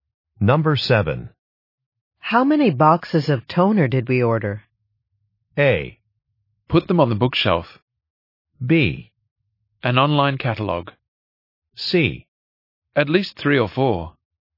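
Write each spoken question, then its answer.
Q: How many boxes of toner did we order?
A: C: At least 3 or 4.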